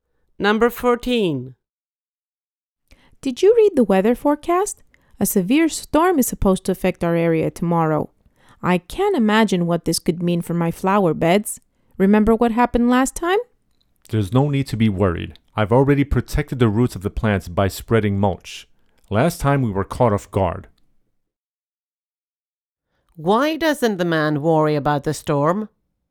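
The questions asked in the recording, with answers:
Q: Why doesn't the man worry about the storm?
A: He has already protected the plants' roots with mulch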